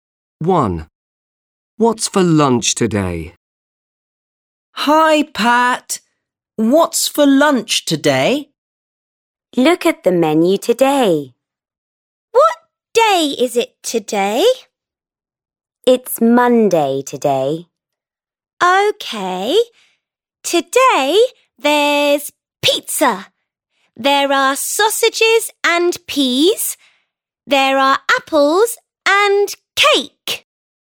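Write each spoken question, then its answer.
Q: What's for lunch today?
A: Pizza, sausages and peas, apples and cake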